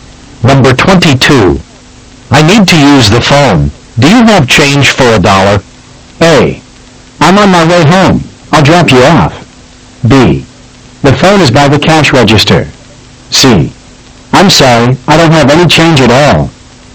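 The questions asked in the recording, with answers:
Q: Do you have change for a dollar?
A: C: I'm sorry, I don't have any change at all.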